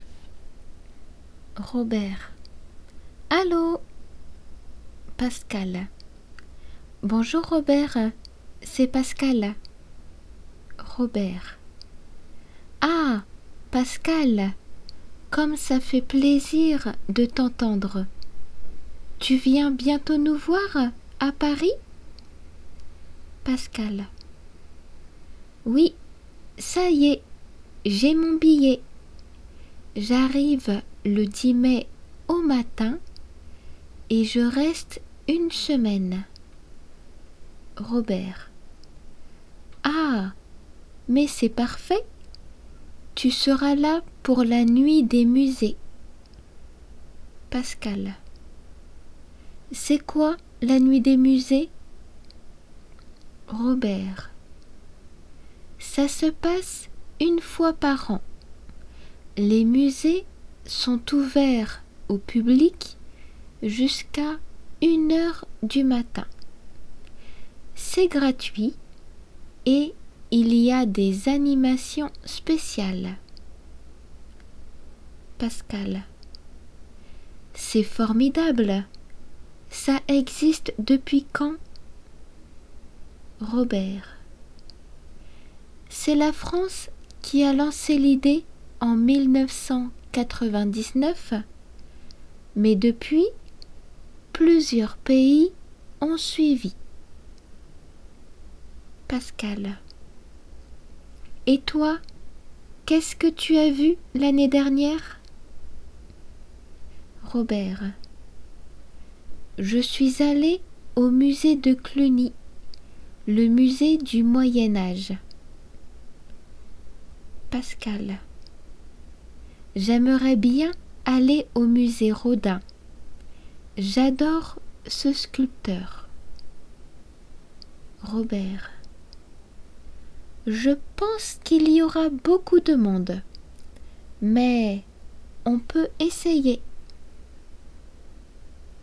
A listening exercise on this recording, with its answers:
質問を聞き空欄を埋める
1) Pour annoncer son ( ).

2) Ils proposent des choses ( ).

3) C'est la ( ).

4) D'autres pays ont ( ).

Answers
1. arrivée
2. spéciales
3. France
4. suivi

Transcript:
Pascale : Bonjour Robert, c'est Pascale.
R : Ah Pascale, comme ça fait plaisir de t'entendre . Tu viens bientôt nous voir à Paris ?
Pascale : Oui , ça y est. J'ai mon billet. J'arrive le 10 mai au matin et je reste une semaine.
R : Ah mais c'est parfait ! Tu seras là pour la Nuit des Musées !
P : C'est quoi la Nuit des Musées ?
R : Ça se passe une fois par an : les musées sont ouverts au public jusqu'à une heure du matin. C'est gratuit et il y a des animations spéciales.
P : C'est formidable! Ça existe depuis quand ?
R : C'est la France qui a lancé l'idée en 1999 mais depuis plusieurs pays ont suivi.
P : Et toi, qu'est-ce que tu as vu l'année dernière ?
R : Je suis allé au musée de Cluny, le musée du Moyen Âge .
P : J'aimerais bien aller au musée Rodin.
J'adore ce sculpteur.
R : Je pense qu'il y aura beaucoup de monde.
Mais on peut essayer. Delf B1テキストから。

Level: Delf B1